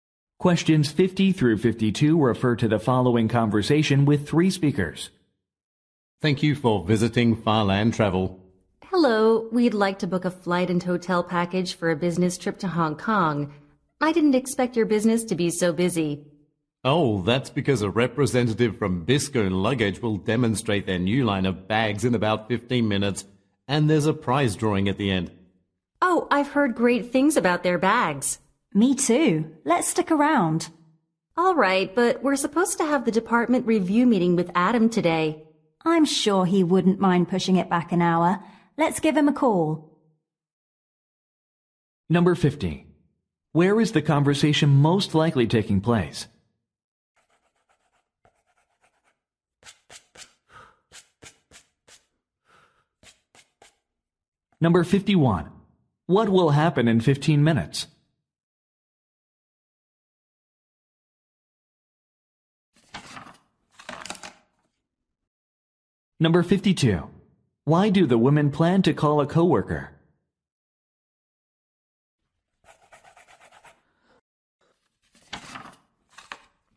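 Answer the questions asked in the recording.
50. At a travel agency
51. A demonstration of new bags
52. To postpone a meeting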